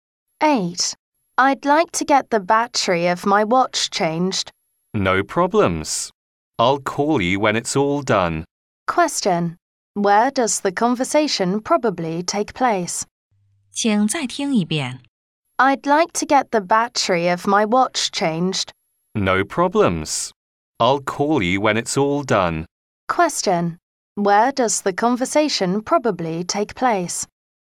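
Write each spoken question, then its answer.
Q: Where does the conversation probably take place?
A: At a watch repair shop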